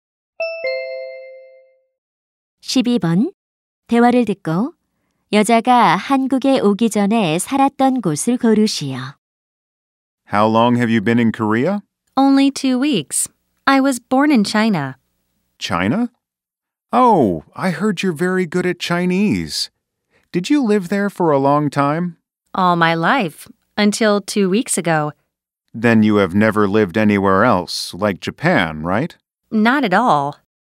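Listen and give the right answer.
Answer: 중국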